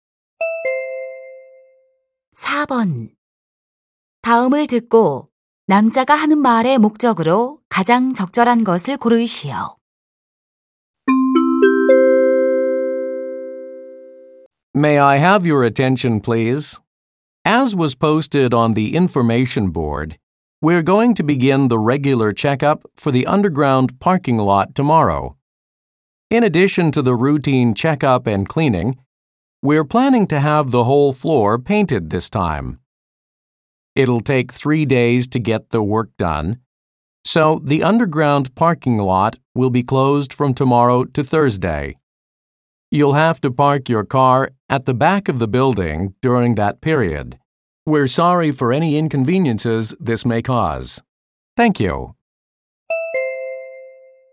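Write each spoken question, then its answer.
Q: 다음을 듣고 남자가 하는 말의 목적으로 가장 적절한 것을 고르시오.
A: 지하 주차장 점검으로 인한 폐쇄를 알리려고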